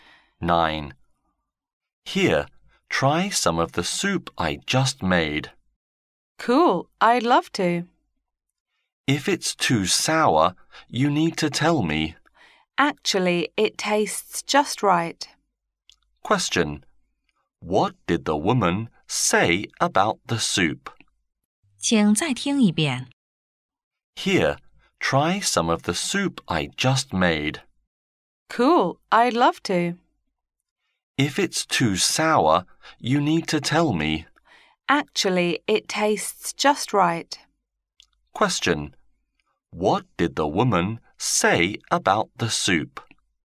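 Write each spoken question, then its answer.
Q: What did the woman say about the soup?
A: It tastes just right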